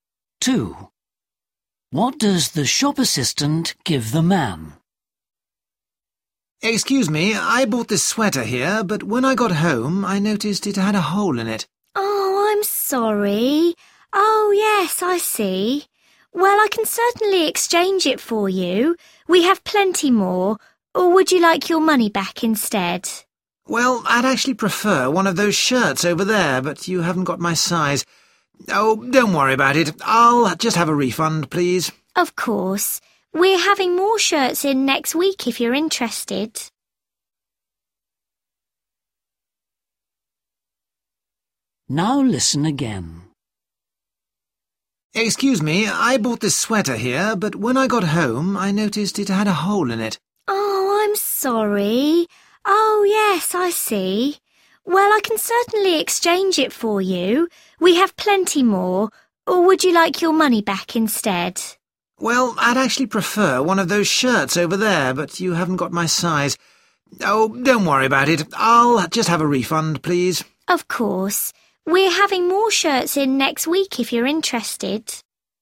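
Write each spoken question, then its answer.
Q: What does the shop assistant give the man?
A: a refund (his money back)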